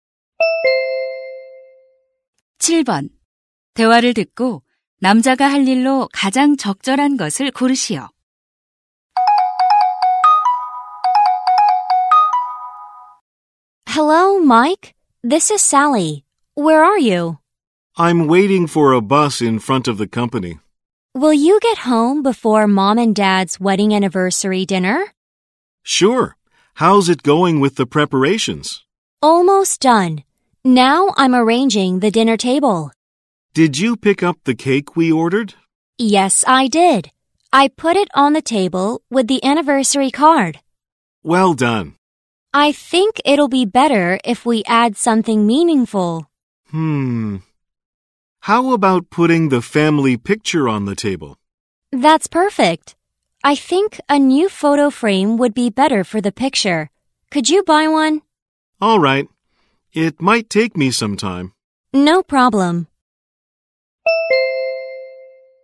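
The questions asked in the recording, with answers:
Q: 대화를 듣고 남자가 할 일로 가장 적절한 것을 고르시오.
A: 새 액자 사기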